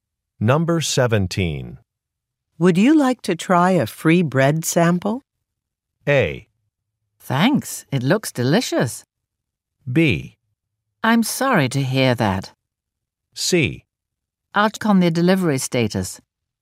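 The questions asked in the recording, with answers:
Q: Would you like to try a free bread sample?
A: A: Thanks, it looks delicious.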